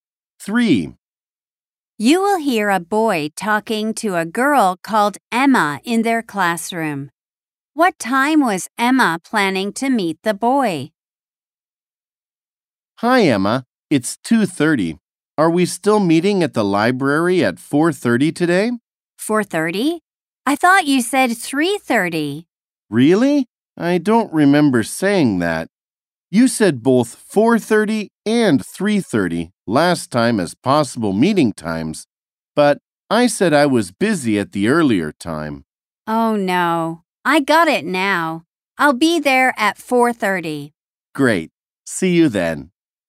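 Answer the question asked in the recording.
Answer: 3:30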